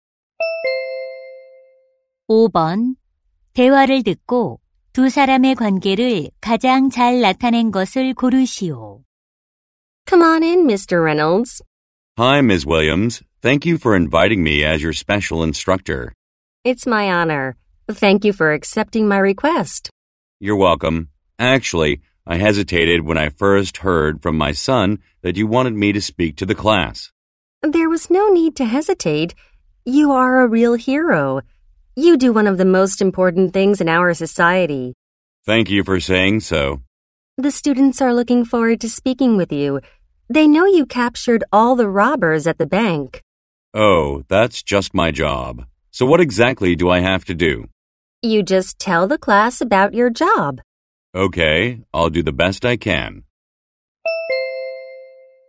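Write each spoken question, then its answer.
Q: 대화를 듣고 두 사람의 관계를 가장 잘 나타낸 것을 고르시오.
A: 교사 - 경찰관(학부모)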